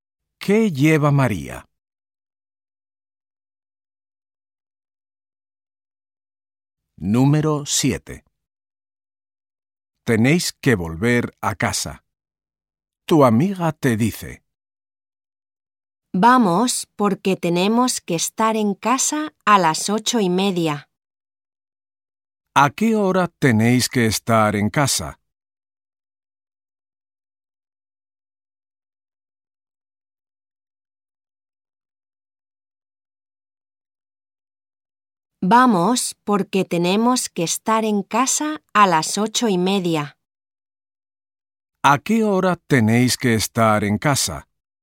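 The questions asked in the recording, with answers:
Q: ¿A qué hora tenéis que estar en casa?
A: A las 8:30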